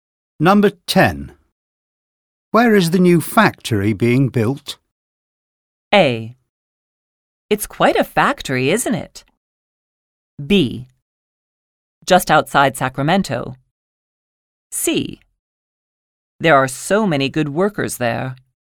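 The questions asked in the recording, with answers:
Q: Where is the new factory being built?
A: B: Just outside Sacramento.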